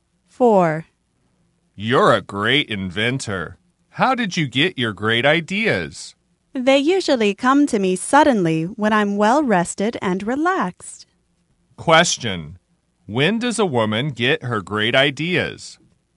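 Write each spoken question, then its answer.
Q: When does a woman get her great ideas?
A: When she is well rested and relaxed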